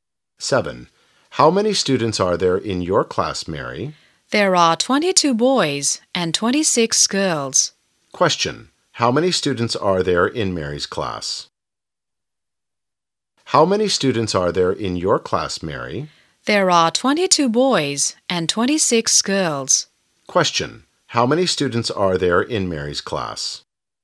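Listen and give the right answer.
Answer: 48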